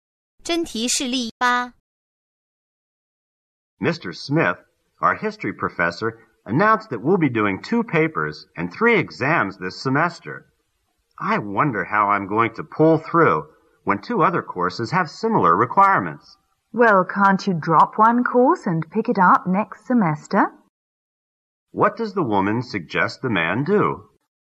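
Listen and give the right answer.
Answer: Drop one course and take it next semester.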